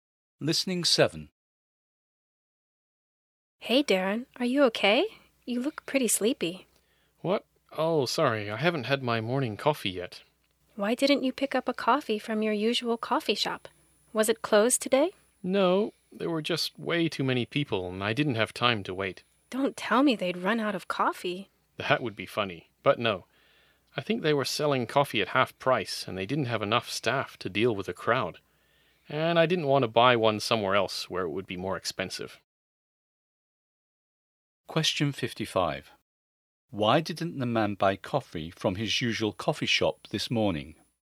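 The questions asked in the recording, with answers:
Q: Why didn't the man buy coffee from his usual coffee shop this morning?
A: There were too many people and he didn't have time to wait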